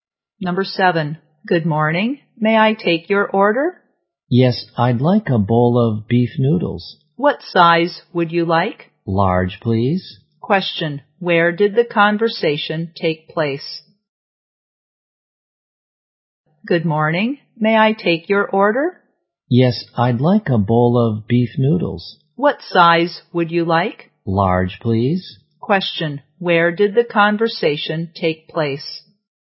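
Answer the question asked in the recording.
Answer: In a restaurant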